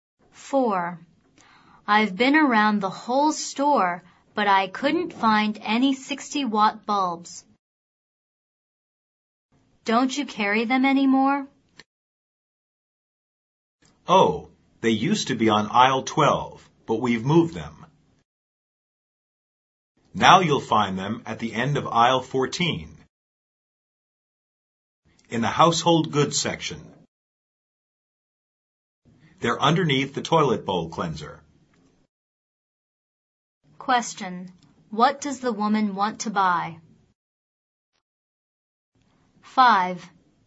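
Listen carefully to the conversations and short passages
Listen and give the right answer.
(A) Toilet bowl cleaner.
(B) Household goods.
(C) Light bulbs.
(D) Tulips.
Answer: (C) Light bulbs.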